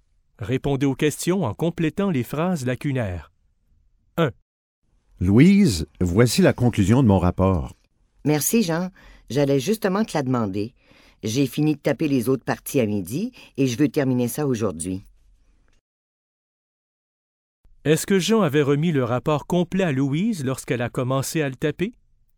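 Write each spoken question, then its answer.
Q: Est-ce que Jean avait remis le rapport complet à Louise lorsqu'elle a commencé à le taper?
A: Non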